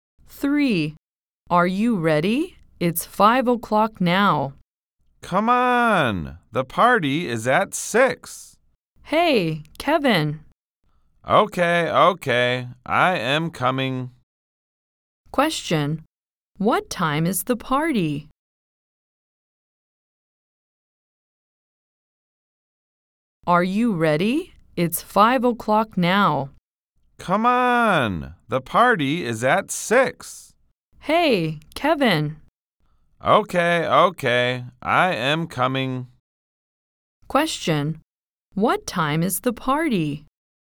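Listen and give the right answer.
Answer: At 6:00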